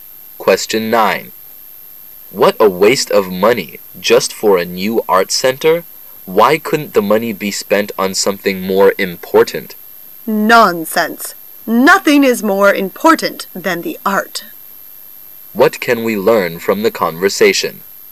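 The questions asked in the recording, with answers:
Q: What can we learn from the conversation?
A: They disagree about spending money on a new art center.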